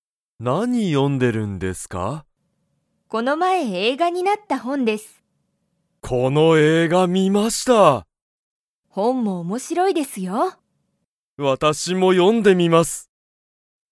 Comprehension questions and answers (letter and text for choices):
松井まついさんは、____映画えいがになった本ほんを読よんでる。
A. この前まえ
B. 今日きょう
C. 次つぎに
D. よく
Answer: A. この前まえ

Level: Level 1